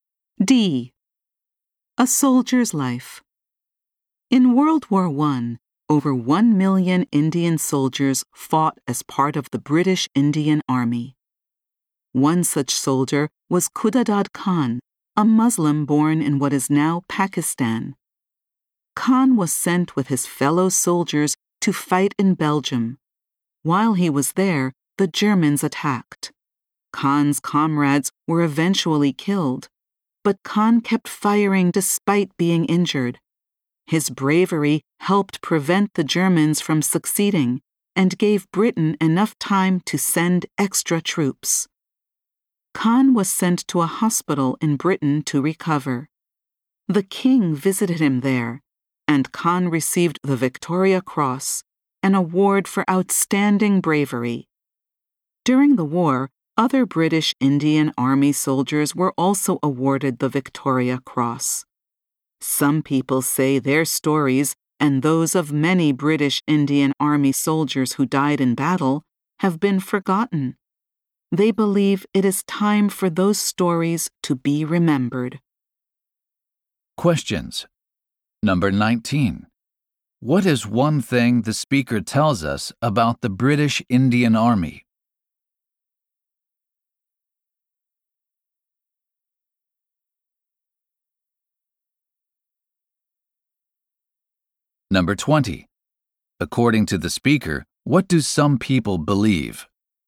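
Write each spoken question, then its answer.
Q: What is one thing the speaker tells us about the British Indian Army?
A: Over 1 million Indian soldiers fought in it in World War I

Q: According to the speaker, what do some people believe?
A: The soldiers' forgotten stories should be remembered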